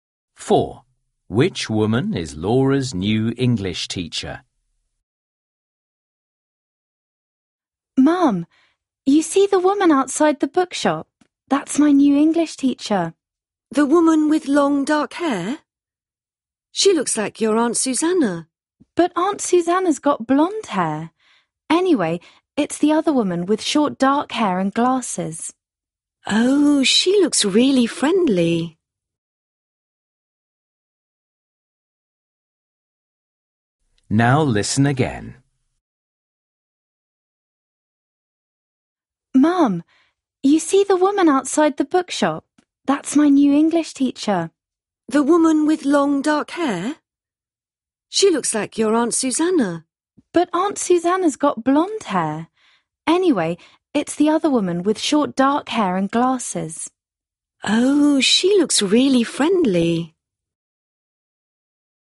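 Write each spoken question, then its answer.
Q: Which woman is Laura's new English teacher?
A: The woman with short dark hair and glasses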